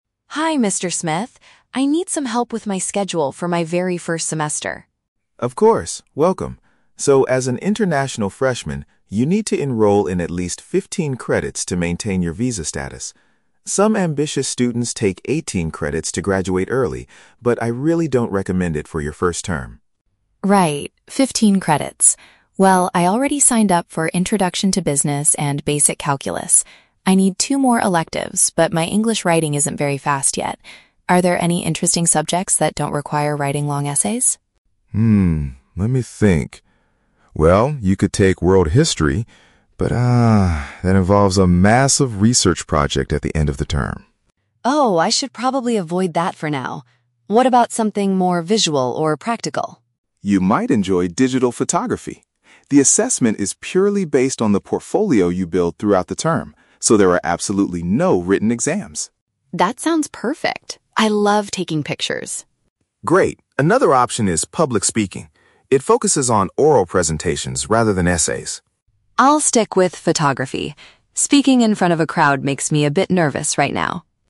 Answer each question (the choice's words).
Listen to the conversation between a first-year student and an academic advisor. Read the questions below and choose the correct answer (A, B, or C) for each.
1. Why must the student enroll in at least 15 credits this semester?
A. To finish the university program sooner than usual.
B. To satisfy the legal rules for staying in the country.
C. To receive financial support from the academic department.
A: To satisfy the legal rules for staying in the country.

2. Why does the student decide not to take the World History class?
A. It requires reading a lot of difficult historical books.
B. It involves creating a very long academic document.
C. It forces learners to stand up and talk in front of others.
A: It involves creating a very long academic document.

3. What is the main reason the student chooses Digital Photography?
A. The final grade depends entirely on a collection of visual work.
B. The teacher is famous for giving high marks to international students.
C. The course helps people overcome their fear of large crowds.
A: The final grade depends entirely on a collection of visual work.

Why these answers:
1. The Key (Correct): The advisor states that the student needs 15 credits to "maintain your visa status." (Paraphrased: maintain visa status = satisfy the legal rules for staying in the country). The Trap: Option (A) is incorrect. The advisor mentions that some students take 18 credits to "graduate early" (finish sooner), but the 15 credits are strictly for the visa requirement. Not mentioned: Option (C) is a plausible reason for students to take a certain number of credits, but financial support or scholarships are not discussed.
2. The Key (Correct): The advisor warns that World History involves a "massive research project" at the end of the term, which is why the student avoids it to escape writing. (Paraphrased: massive research project = very long academic document). The Trap: Option (C) is a trap. Standing up and talking in front of others refers to the "Public Speaking" class, not World History. Not mentioned: Option (A) is plausible for a history class, but the amount of reading is never mentioned.
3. The Key (Correct): The advisor says the assessment is "purely based on the portfolio you build." (Paraphrased: purely based = depends entirely; portfolio = collection of visual work). The Trap: Option (C) is incorrect because overcoming the fear of crowds relates to the "Public Speaking" class, which the student explicitly rejects because it makes him/her "nervous." Not mentioned: Option (B) is completely fabricated. The teacher's grading habits are not mentioned in the audio.

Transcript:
Student: Hi, Mr. Smith. I need some help with my schedule for my very first semester.
Advisor: Of course, welcome! So, as an international freshman, you need to enroll in at least 15 credits to maintain your visa status. Some ambitious students take 18 credits to graduate early, but I really don't recommend it for your first term.
Student: Right, 15 credits. Well, I already signed up for Introduction to Business and Basic Calculus. I need two more electives, but my English writing isn't very fast yet. Are there any interesting subjects that don't require writing long essays?
Advisor: Hmm, let me think. Well, you could take World History. But, ah, that involves a massive research project at the end of the term.
Student: Oh, I should probably avoid that for now. What about something more visual or practical?
Advisor: You might enjoy Digital Photography. The assessment is purely based on the portfolio you build throughout the term, so there are absolutely no written exams.
Student: That sounds perfect! I love taking pictures.
Advisor: Great. Another option is Public Speaking. It focuses on oral presentations rather than essays.
Student: I'll stick with Photography. Speaking in front of a crowd makes me a bit nervous right now!